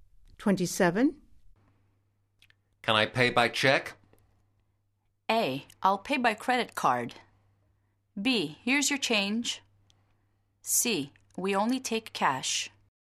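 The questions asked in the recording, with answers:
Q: Can I pay by check?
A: C: We only take cash.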